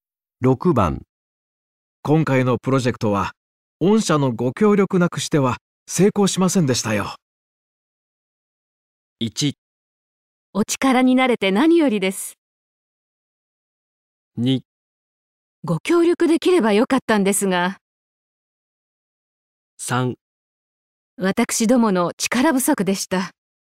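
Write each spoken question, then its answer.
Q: 今回のプロジェクトは、御社のご協力なくしては成功しませんでしたよ。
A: 1: お力になれて何よりです。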